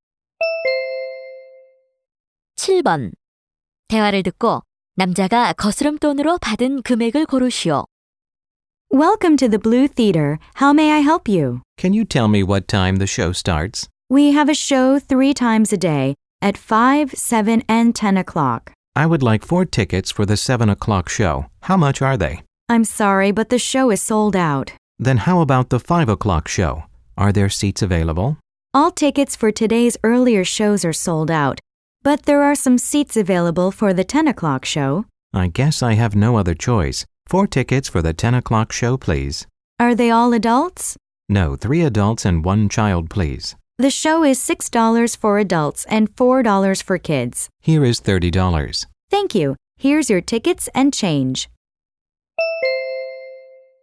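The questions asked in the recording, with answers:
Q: 대화를 듣고 남자가 거스름 돈으로 받은 금액을 고르시오.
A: 8달러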